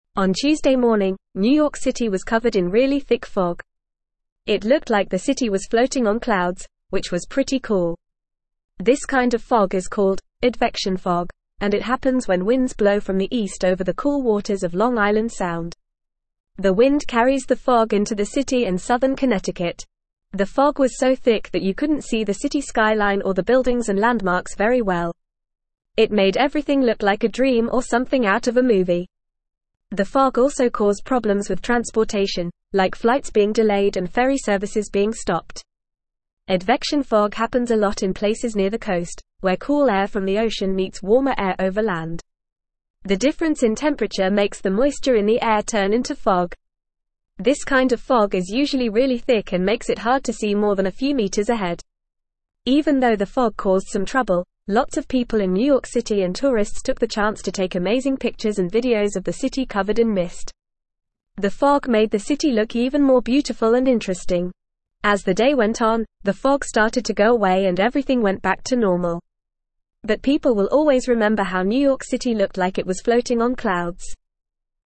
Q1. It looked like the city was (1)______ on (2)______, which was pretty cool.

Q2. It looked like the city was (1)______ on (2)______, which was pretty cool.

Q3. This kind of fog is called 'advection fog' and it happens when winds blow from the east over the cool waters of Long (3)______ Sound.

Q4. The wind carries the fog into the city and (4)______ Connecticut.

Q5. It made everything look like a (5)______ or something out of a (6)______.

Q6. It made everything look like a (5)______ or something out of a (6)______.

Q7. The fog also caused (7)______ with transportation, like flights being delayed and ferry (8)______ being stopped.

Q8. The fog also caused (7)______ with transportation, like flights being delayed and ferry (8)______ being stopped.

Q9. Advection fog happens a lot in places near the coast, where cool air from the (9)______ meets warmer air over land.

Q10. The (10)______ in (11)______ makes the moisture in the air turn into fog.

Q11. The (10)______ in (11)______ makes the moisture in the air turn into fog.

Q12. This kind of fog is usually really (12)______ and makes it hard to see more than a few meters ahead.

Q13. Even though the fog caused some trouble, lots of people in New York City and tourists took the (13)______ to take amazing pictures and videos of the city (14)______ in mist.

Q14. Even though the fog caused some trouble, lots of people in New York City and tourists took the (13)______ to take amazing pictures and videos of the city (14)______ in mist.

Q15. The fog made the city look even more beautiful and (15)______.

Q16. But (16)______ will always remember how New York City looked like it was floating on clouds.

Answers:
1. floating
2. clouds
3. Island
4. southern
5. dream
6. movie
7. problems
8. services
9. ocean
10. difference
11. temperature
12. thick
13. chance
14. covered
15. interesting
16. people

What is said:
On Tuesday morning, New York City was covered in really thick fog. It looked like the city was floating on clouds, which was pretty cool. This kind of fog is called 'advection fog' and it happens when winds blow from the east over the cool waters of Long Island Sound. The wind carries the fog into the city and southern Connecticut.
The fog was so thick that you couldn't see the city skyline or the buildings and landmarks very well. It made everything look like a dream or something out of a movie. The fog also caused problems with transportation, like flights being delayed and ferry services being stopped.
Advection fog happens a lot in places near the coast, where cool air from the ocean meets warmer air over land. The difference in temperature makes the moisture in the air turn into fog. This kind of fog is usually really thick and makes it hard to see more than a few meters ahead.
Even though the fog caused some trouble, lots of people in New York City and tourists took the chance to take amazing pictures and videos of the city covered in mist. The fog made the city look even more beautiful and interesting. As the day went on, the fog started to go away and everything went back to normal. But people will always remember how New York City looked like it was floating on clouds.

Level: Level 3